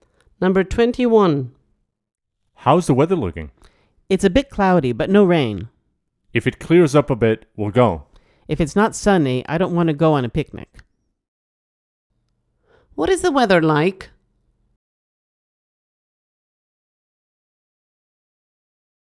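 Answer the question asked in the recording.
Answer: Cloudy but no rain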